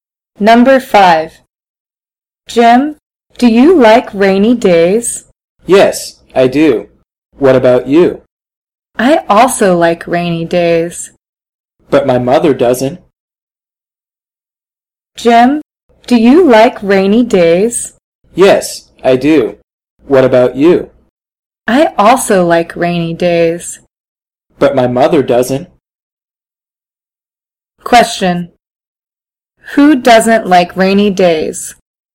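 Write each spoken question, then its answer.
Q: Who doesn't like rainy days?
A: The speaker's mother.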